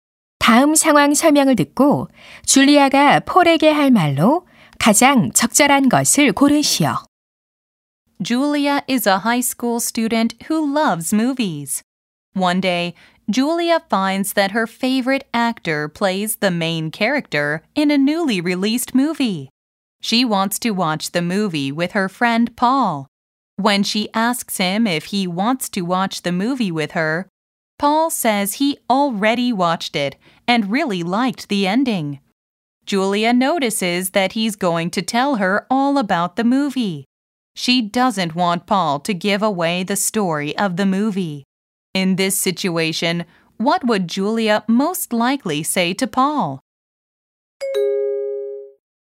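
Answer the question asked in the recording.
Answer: Please don't tell me the story or the ending of the movie.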